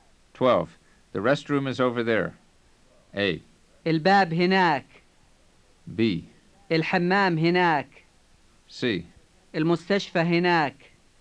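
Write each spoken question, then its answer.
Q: The restroom is over there.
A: B: الحمام هناك.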